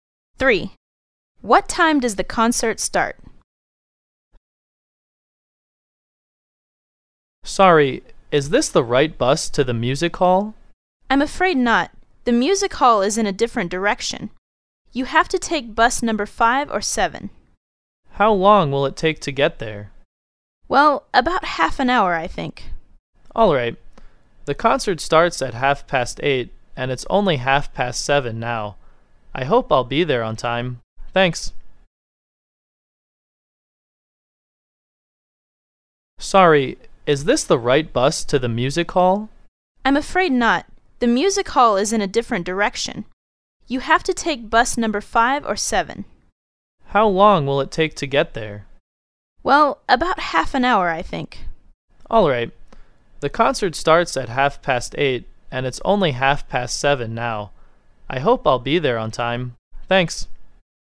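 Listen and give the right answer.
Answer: At 8:30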